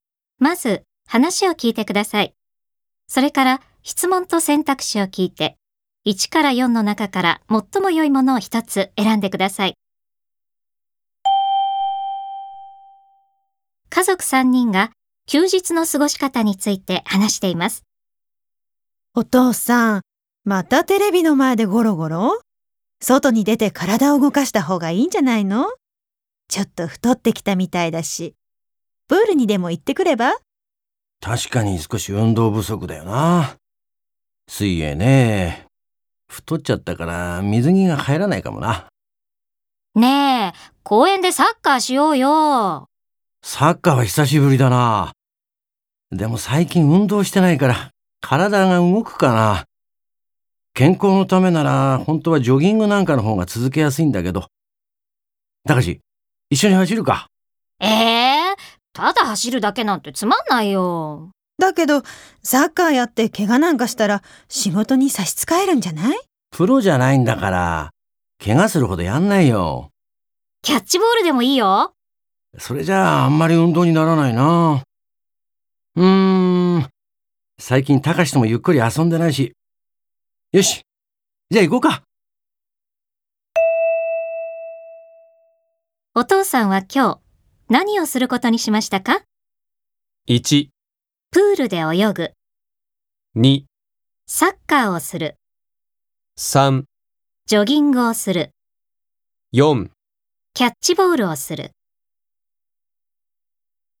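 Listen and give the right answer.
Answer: 2: サッカーをする。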